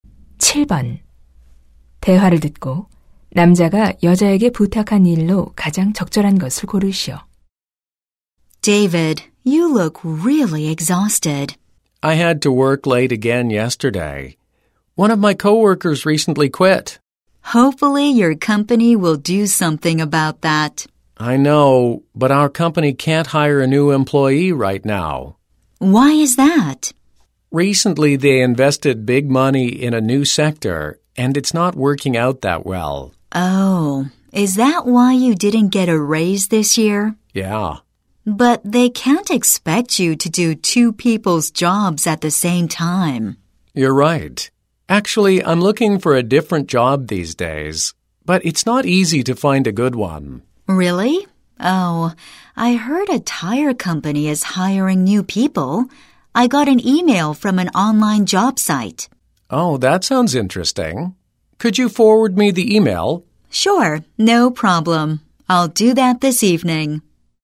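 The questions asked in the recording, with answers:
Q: 대화를 듣고 남자가 여자에게 부탁한 일로 가장 적절한 것을 고르시오.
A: 구인 이메일 전달하기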